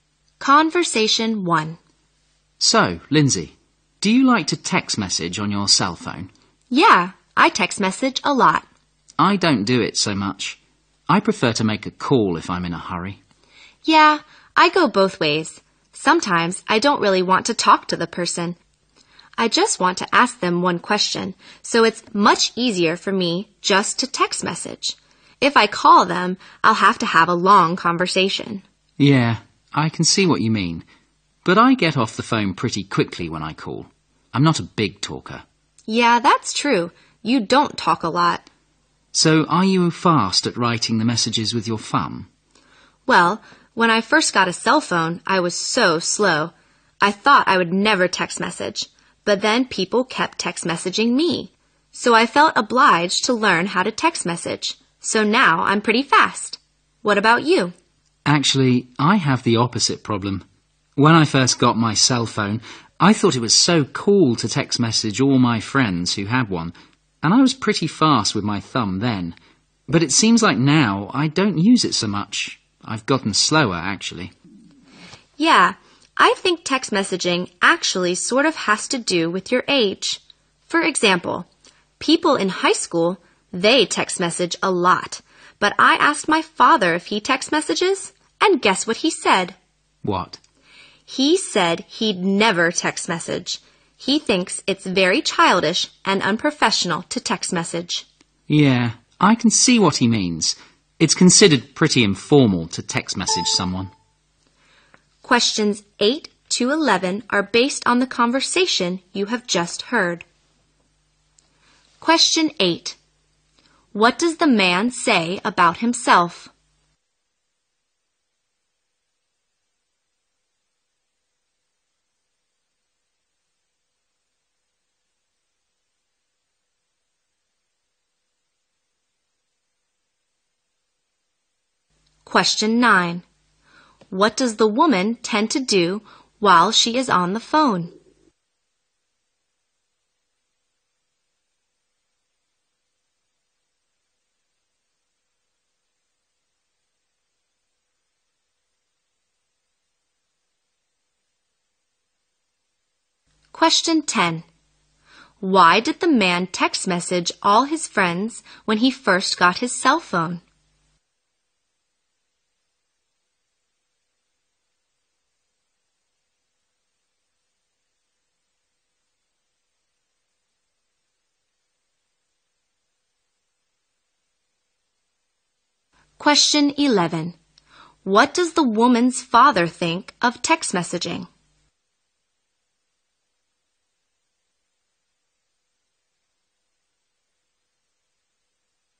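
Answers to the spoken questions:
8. He is not a big talker.
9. Have long conversations.
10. He thought it was cool.
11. It is childish and unprofessional.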